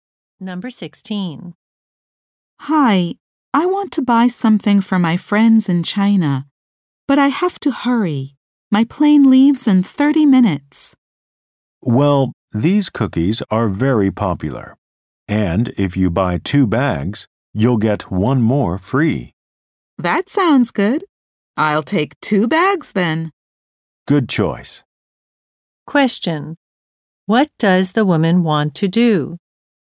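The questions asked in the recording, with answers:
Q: What does the woman want to do?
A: Quickly buy a gift for her friends in China.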